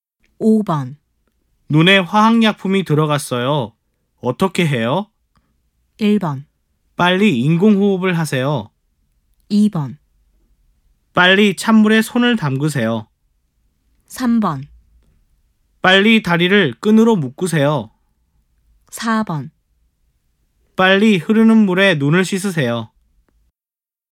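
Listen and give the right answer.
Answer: 4: 빨리 흐르는 물에 눈을 씻으세요.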